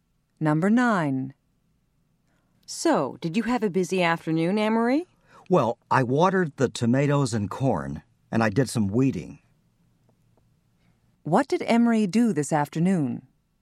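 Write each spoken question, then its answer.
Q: What did Emery do this afternoon?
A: He watered the tomatoes and corn and did some weeding.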